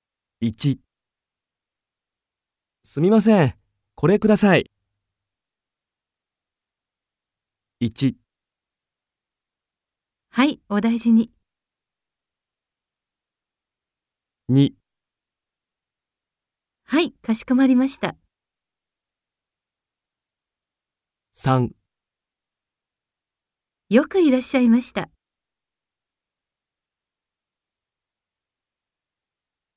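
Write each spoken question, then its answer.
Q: すみません、これください。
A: 2: はい、かしこまりました。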